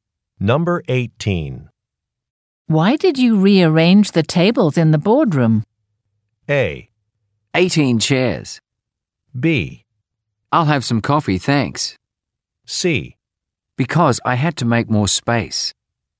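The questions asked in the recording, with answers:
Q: Why did you rearrange the tables in the boardroom?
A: C: Because I had to make more space.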